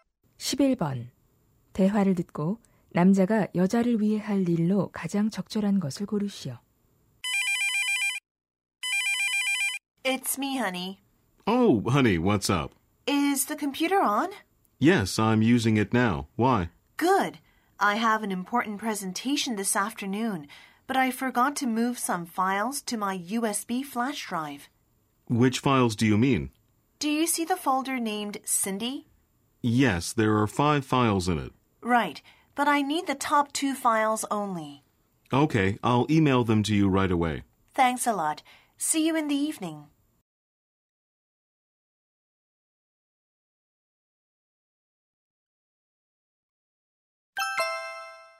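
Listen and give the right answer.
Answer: 파일 두 개를 이메일로 보내 주기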